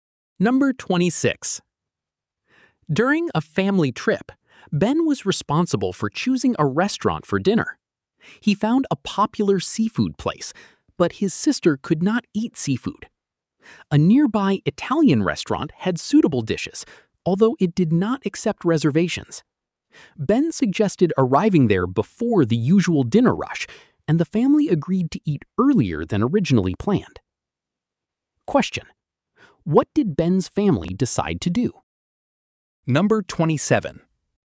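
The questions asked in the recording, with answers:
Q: what did Ben's family decide to do?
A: Eat earlier at the Italian restaurant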